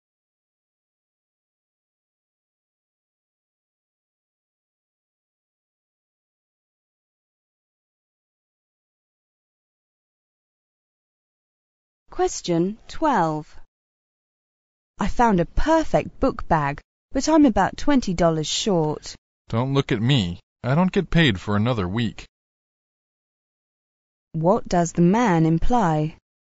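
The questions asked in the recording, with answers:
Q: What does the man imply?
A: He can't lend her the money.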